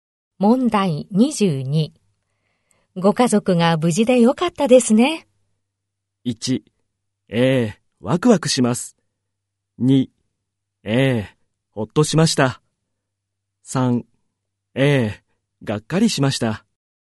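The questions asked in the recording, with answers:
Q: ご家族が無事でよかったですね。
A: 2: ええ、ほっとしました。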